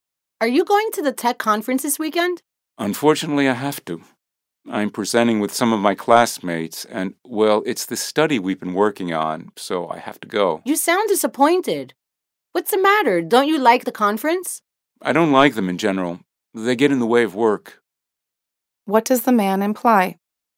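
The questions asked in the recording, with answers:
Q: What does the man imply?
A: He doesn't want to go to the conference and is going only because he has to present; he dislikes conferences because they get in the way of work.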